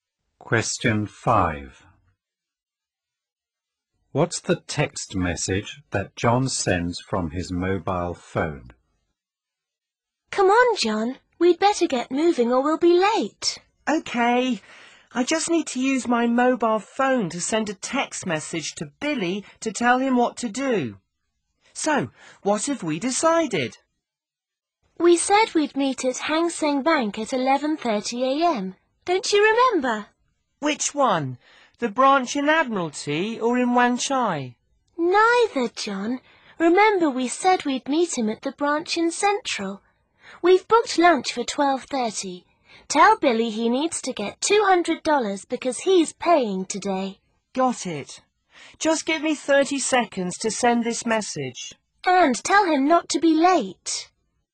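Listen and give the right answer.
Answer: Meet at Hang Seng Bank, Central branch, at 11:30 a.m.; bring $200 because you're paying; don't be late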